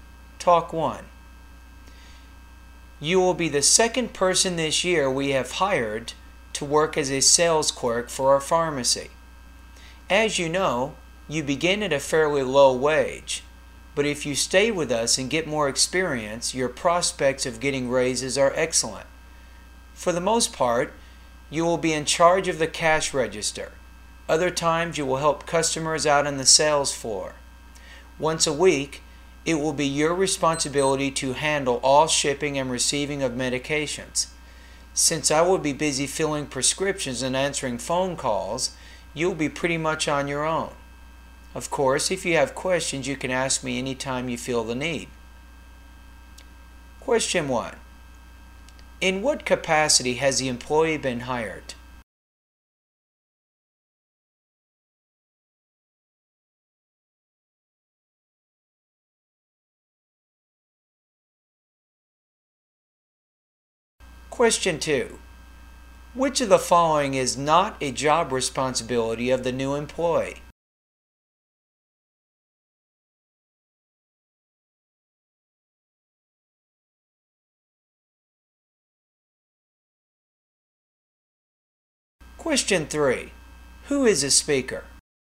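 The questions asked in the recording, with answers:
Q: In what capacity has the employee been hired?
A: As a sales clerk

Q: Who is the speaker?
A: The pharmacist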